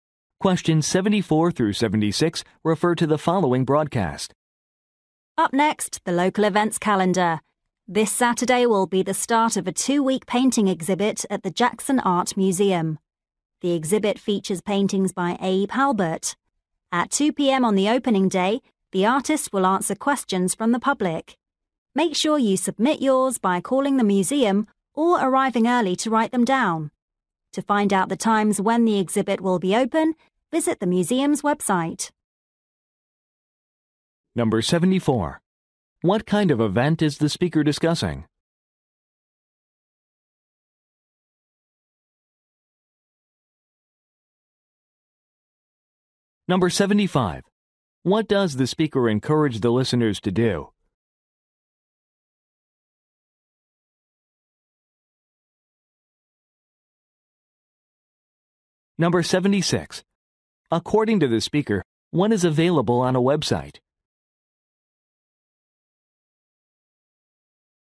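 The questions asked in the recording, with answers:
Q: What kind of event is the speaker discussing?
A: A painting exhibit

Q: What does the speaker encourage the listeners to do?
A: Submit questions for the artist

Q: According to the speaker, what is available on a website?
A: The exhibit's opening times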